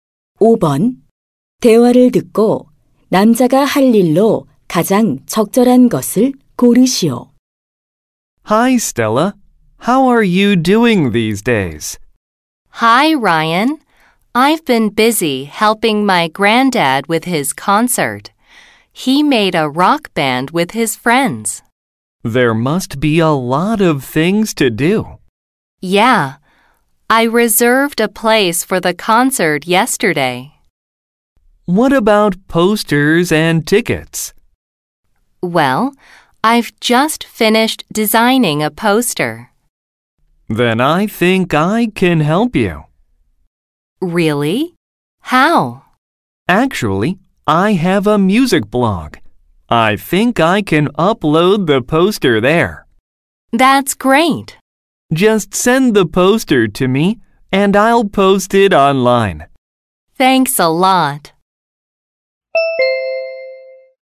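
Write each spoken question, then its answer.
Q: 대화를 듣고 남자가 할 일로 가장 적절한 것을 고르시오.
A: 자기 블로그에 포스터 올리기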